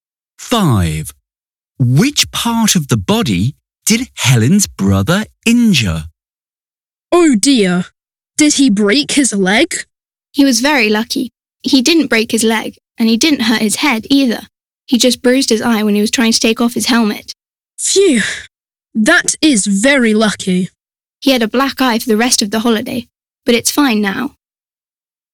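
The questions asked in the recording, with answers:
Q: Which part of the body did Helen's brother injure?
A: his eye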